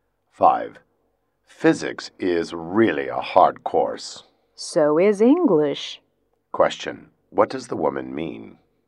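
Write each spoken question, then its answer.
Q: What does the woman mean?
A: English is also hard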